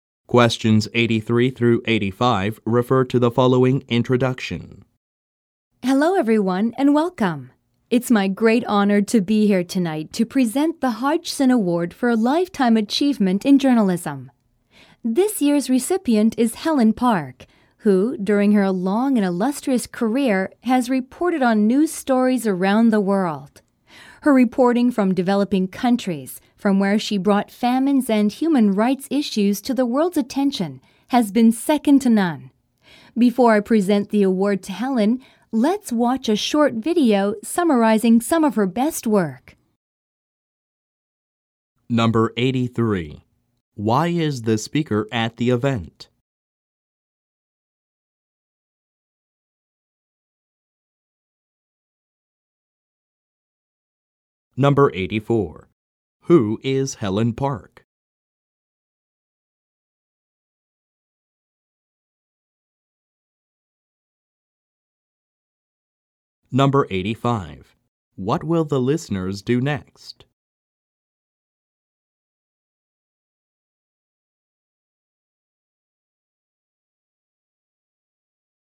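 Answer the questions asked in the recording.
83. To present an award
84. A journalist
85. Watch a short video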